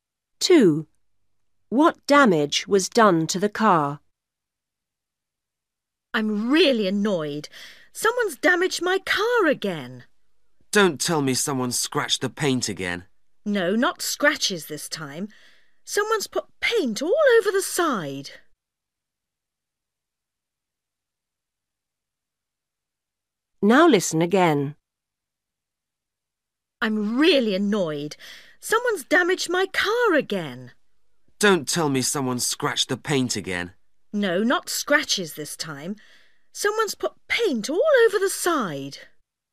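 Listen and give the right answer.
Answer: Someone put paint all over the side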